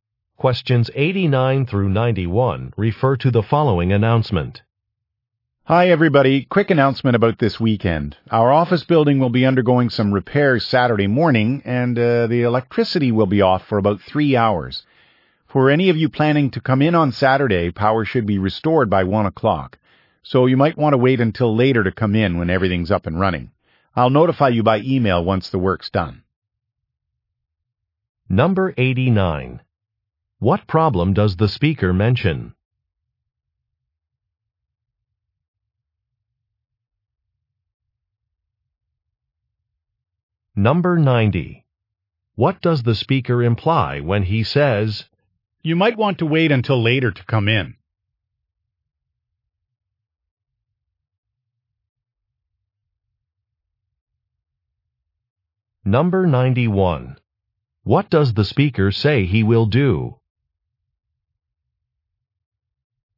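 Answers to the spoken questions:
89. The electricity will be off for about three hours
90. The power will not be on until 1 o'clock
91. Send an email when the work is done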